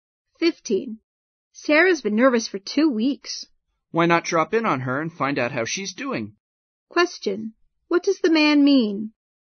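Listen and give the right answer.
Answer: They should visit Sarah to see how she is.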